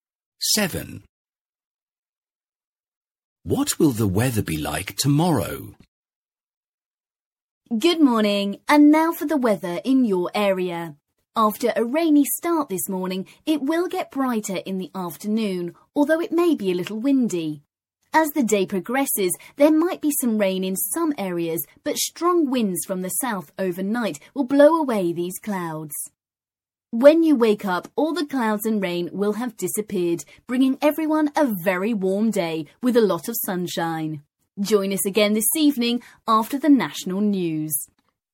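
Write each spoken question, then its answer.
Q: What will the weather be like tomorrow?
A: Warm and sunny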